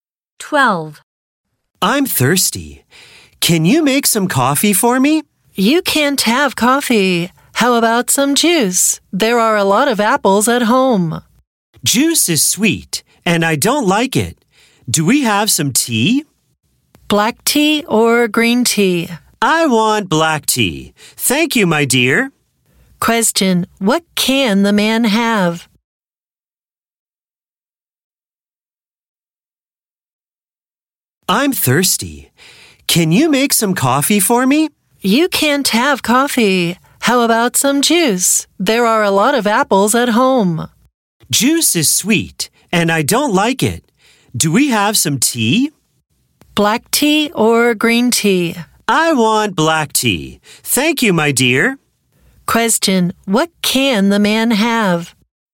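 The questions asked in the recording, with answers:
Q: Question, what can the man have?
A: Black tea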